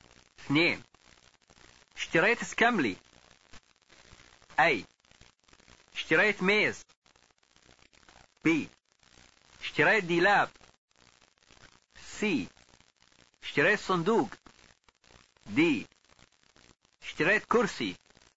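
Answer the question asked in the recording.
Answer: د: اشتريت كرسي.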